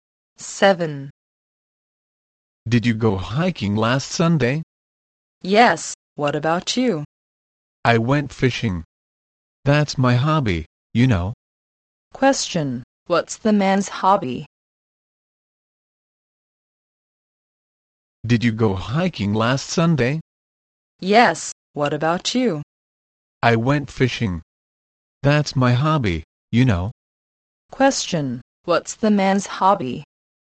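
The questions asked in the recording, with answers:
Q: Question, what's the man's hobby?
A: Fishing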